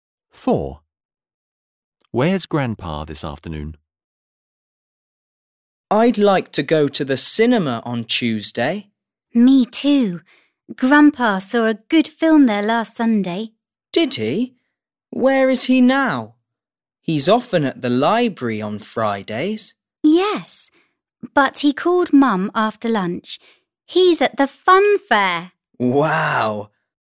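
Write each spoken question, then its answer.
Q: Where's Grandpa this afternoon?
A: At the fun fair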